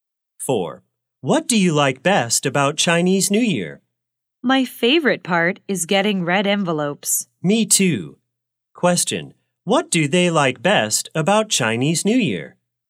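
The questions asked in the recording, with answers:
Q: Question, what do they like best about Chinese New Year?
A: Getting red envelopes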